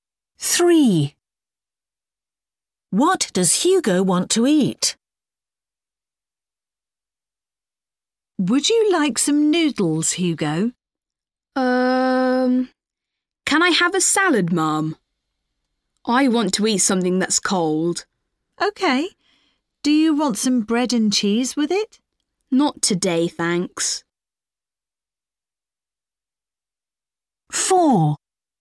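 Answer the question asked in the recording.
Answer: A salad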